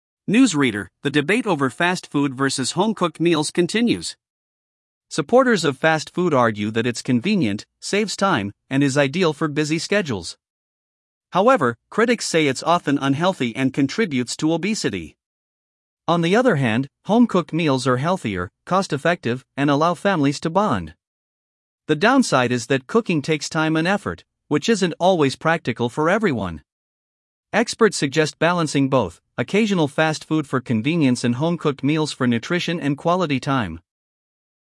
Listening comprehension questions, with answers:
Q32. What are the advantages of fast food?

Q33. What is one criticism of fast food?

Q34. What benefits do home-cooked meals offer?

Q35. What is a downside of home-cooked meals?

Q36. What balance do experts suggest?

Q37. Why do people choose fast food?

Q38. What benefit of home-cooked meals involves families?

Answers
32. Convenient, saves time
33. Unhealthy, obesity
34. Healthier, cost-effective
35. Takes time and effort
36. Balance both options
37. Busy schedules
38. Allows families to bond

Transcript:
News Reader: The debate over fast food versus home-cooked meals continues. Supporters of fast food argue that it's convenient, saves time, and is ideal for busy schedules. However, critics say it's often unhealthy and contributes to obesity.
On the other hand, home-cooked meals are healthier, cost-effective, and allow families to bond. The downside is that cooking takes time and effort, which isn't always practical for everyone.
Experts suggest balancing both: occasional fast food for convenience and home-cooked meals for nutrition and quality time.